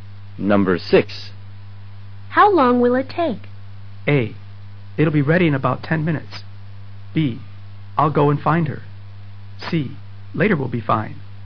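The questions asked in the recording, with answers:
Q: How long will it take?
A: A: It'll be ready in about 10 minutes.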